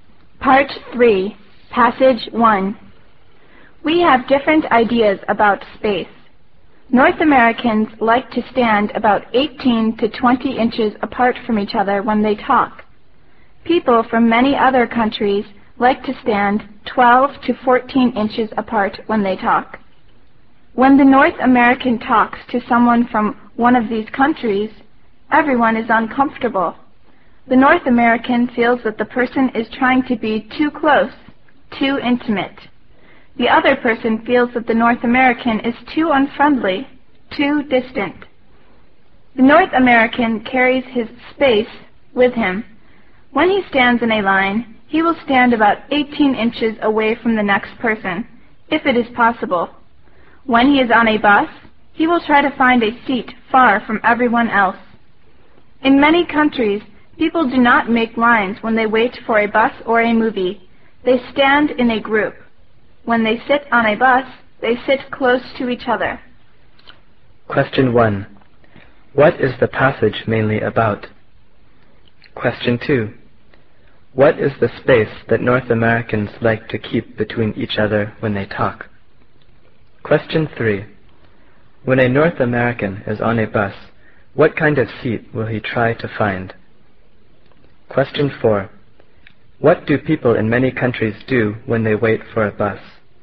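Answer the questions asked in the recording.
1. Different ideas about personal space
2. About 18 to 20 inches
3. A seat far from everyone else
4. They stand in a group instead of making lines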